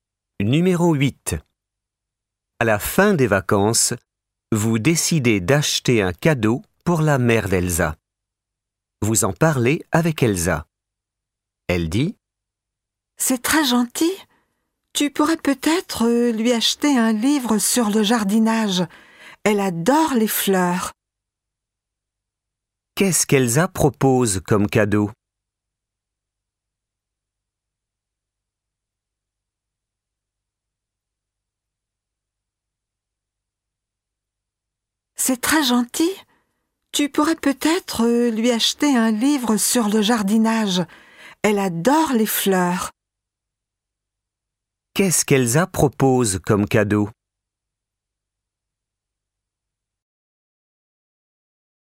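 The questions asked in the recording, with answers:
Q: Qu'est-ce qu'Elsa propose comme cadeau?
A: Un livre sur le jardinage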